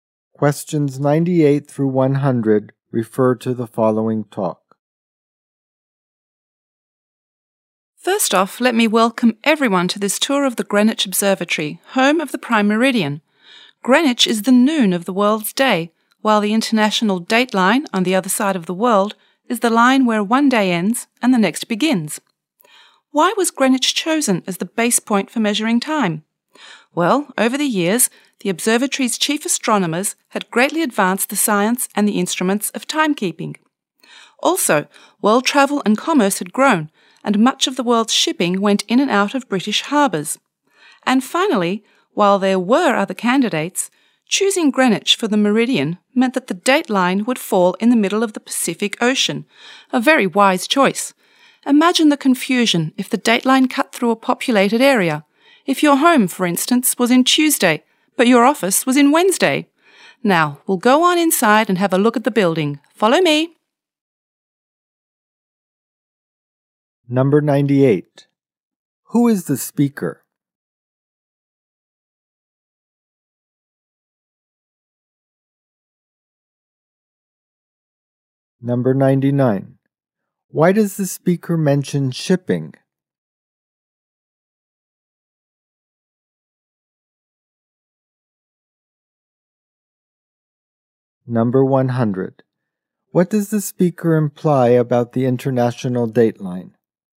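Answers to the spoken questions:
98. A tour guide at the Greenwich Observatory
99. To explain why Greenwich was chosen: much of world shipping went through British harbours
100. Its location in the middle of the Pacific avoids confusion in populated areas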